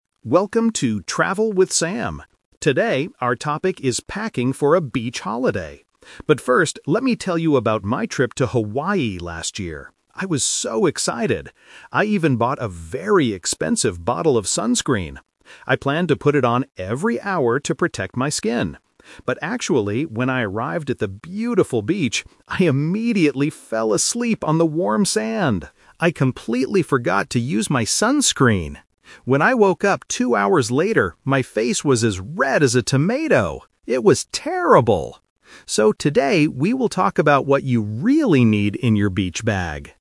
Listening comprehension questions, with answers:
Listen to the introduction of a travel podcast and choose the correct answer (A, B, or C) for each question.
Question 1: What did Sam buy for his trip to Hawaii?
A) A beach bag.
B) A bottle of sunscreen.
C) A new swimsuit.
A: B) A bottle of sunscreen.

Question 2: What did Sam actually do when he arrived at the beach?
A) He put on his sunscreen.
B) He went swimming in the sea.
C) He fell asleep on the sand.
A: C) He fell asleep on the sand.

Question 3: What happened to Sam's face?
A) It became very red.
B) It got a nice brown color.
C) It was covered in sand.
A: A) It became very red.

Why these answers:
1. Sam explicitly says, "I even bought a very expensive bottle of sunscreen." Option A is the trap: he mentions a "beach bag" at the very end of the audio as the topic for today, but he didn't say he bought it for the Hawaii trip. Option C is a plausible beach item but is never mentioned.
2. Sam states, "...when I arrived at the beautiful beach, I immediately fell asleep on the warm sand!" Option A is the trap: he "planned" to put on sunscreen, but he completely forgot. Option B is a plausible beach activity but is not mentioned in the audio.
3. Sam describes his face when he woke up: "my face was as red as a tomato." Option B is the trap: people usually go to the beach to get a nice brown color (a tan), but that is not what happened to Sam. Option C is plausible since he slept on the sand, but it is not mentioned.

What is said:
Host: Welcome to "Travel with Sam"! Today, our topic is packing for a beach holiday. But first, let me tell you about my trip to Hawaii last year. I was so excited. I even bought a very expensive bottle of sunscreen. I planned to put it on every hour to protect my skin. But actually, when I arrived at the beautiful beach, I immediately fell asleep on the warm sand! I completely forgot to use my sunscreen. When I woke up two hours later, my face was as red as a tomato. It was terrible! So, today we will talk about what you really need in your beach bag.

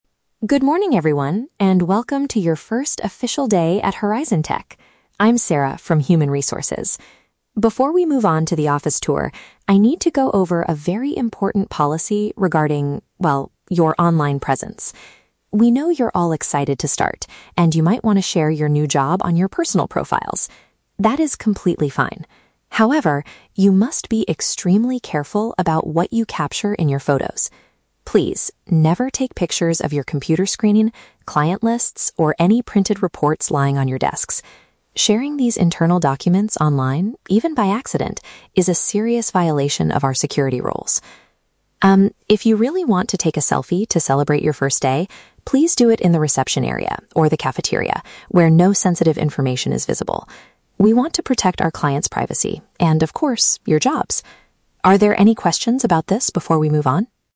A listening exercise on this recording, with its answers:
Listen to a Human Resources manager talking to new employees. For each question, choose the correct answer (A, B, or C).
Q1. What is the main purpose of the manager's talk?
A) To explain how to log in to the new office computers.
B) To warn staff about sharing private business information online.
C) To introduce the food options in the company cafeteria.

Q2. What are the new employees allowed to do?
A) Take a photo of themselves in the entrance hall.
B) Post pictures of the reports they are working on.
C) Send online friend requests to the company's clients.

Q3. Why does the company have this strict rule?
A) To keep customer details safe and secure.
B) To stop workers from using their phones during office hours.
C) To make sure the reception area looks professional.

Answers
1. B) To warn staff about sharing private business information online.
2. A) Take a photo of themselves in the entrance hall.
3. A) To keep customer details safe and secure.

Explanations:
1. Sarah's main point is to warn employees not to share pictures of screens or reports online (private business information). Option (A) is a trap; she mentions the "computer screen", but not how to log in or use the computers. Option (C) is a trap; she mentions the "cafeteria" as a place to take photos, but she is not talking about food.
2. Sarah says it is okay to take a "selfie" (a photo of themselves) in the "reception area" (entrance hall). Option (B) is a trap; she explicitly says never take pictures of printed reports. Option (C) is a trap; she mentions "client lists", but she does not say employees should send them friend requests.
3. Sarah states that the rule is there to "protect our clients' privacy," which means keeping their details safe. Option (B) is plausible in a workplace, but it is never mentioned in the audio. Option (C) is a trap; the reception area is mentioned, but not in the context of making it look professional.

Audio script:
Sarah (HR Manager): Good morning, everyone, and welcome to your first official day at Horizon Tech. I'm Sarah from Human Resources. Before we move on to the office tour, I need to go over a very important policy regarding... well, your online presence. We know you're all excited to start, and you might want to share your new job on your personal profiles. That is completely fine. However, you must be extremely careful about what you capture in your photos. Please, never take pictures of your computer screen, client lists, or any printed reports lying on your desks. Sharing these internal documents online, even by accident, is a serious violation of our security rules. Um, if you really want to take a selfie to celebrate your first day, please do it in the reception area or the cafeteria, where no sensitive information is visible. We want to protect our clients' privacy, and of course, your jobs. Are there any questions about this before we move on?

